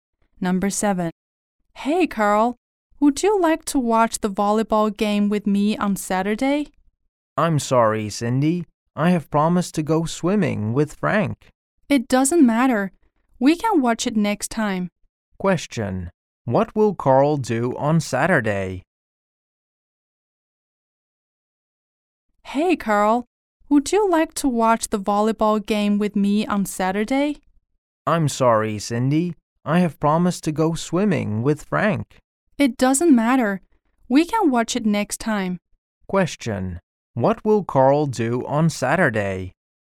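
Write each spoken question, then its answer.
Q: Question: What will Carl do on Saturday?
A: Go swimming with Frank.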